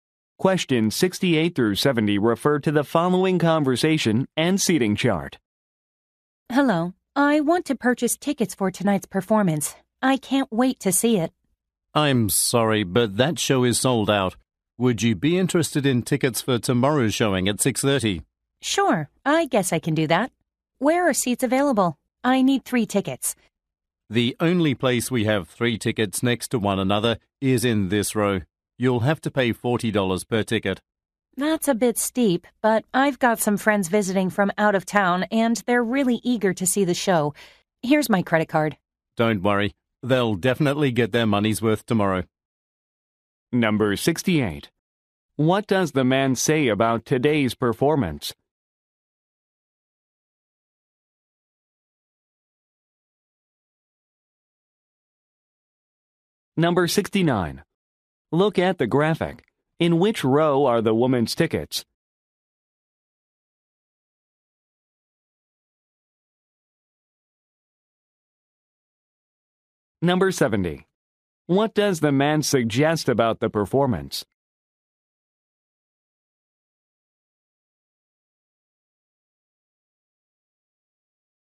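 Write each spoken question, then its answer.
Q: What does the man say about today's performance?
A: It is sold out

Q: What does the man suggest about the performance?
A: It will be worth the money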